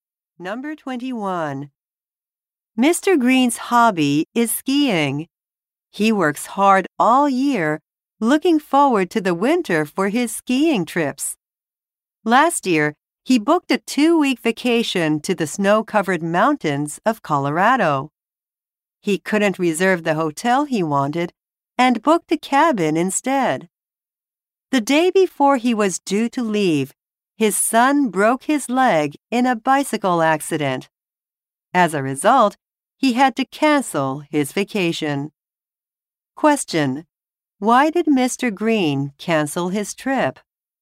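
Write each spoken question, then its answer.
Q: Why did Mr. Green cancel his trip?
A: His son broke his leg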